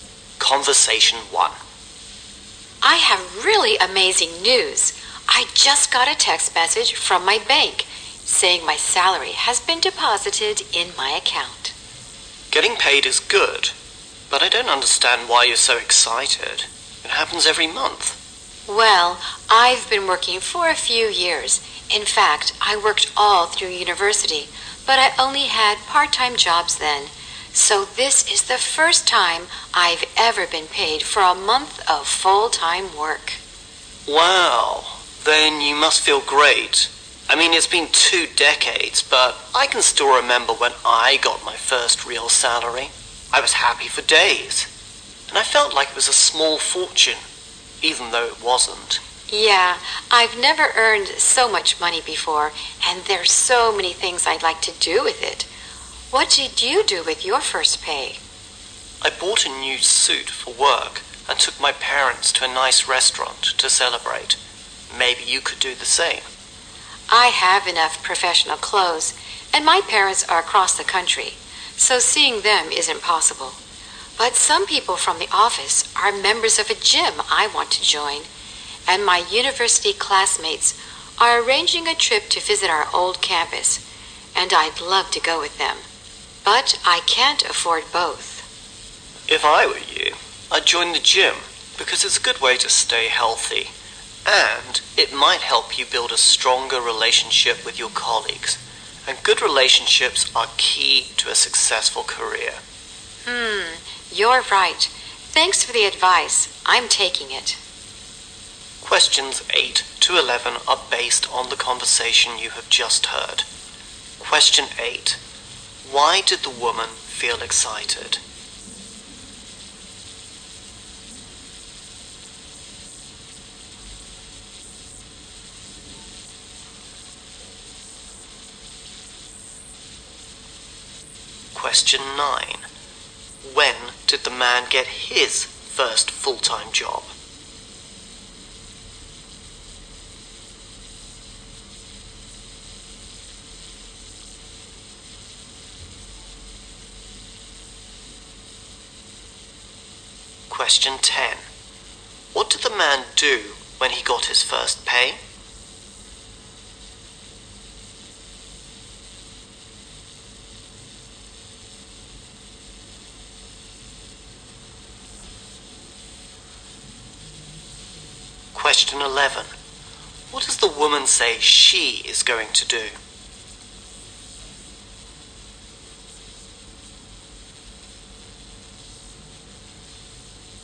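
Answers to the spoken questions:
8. She got her first salary for a month of full-time work.
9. About two decades ago.
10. He bought a new suit for work and took his parents to a nice restaurant.
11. Join the gym.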